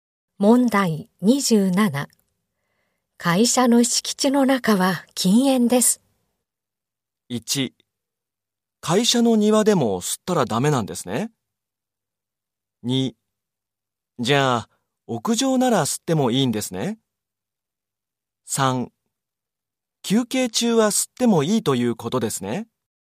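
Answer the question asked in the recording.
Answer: 1: 会社の庭でも吸ったらダメなんですね。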